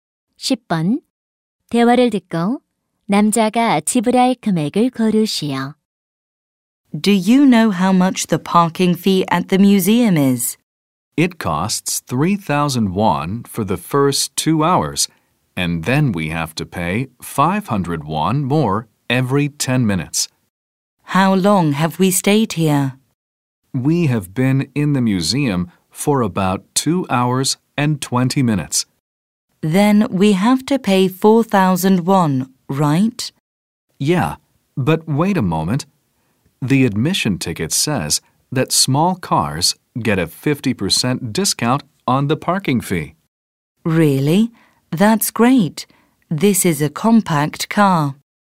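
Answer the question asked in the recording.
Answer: 2,000원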